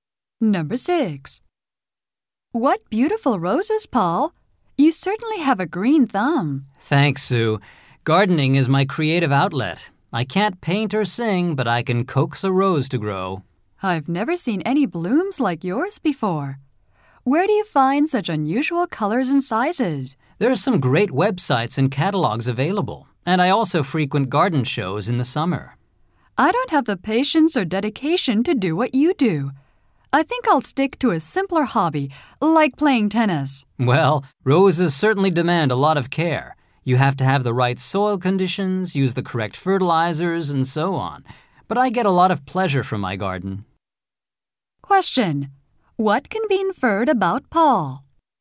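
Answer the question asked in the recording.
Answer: He puts a lot of time and care into growing roses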